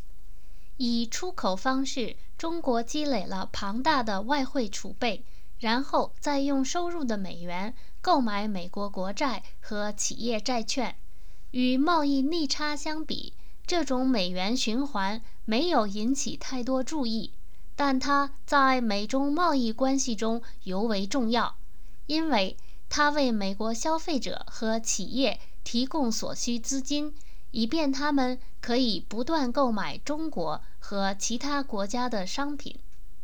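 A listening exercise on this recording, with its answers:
Please answer the following questions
Why is it said to be very important in the Sino-American trading relationship that China buys America's government bonds and enterprise bonds?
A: It gives American consumers and businesses the money they need to keep buying goods from China and other countries

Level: M.Phil Year 2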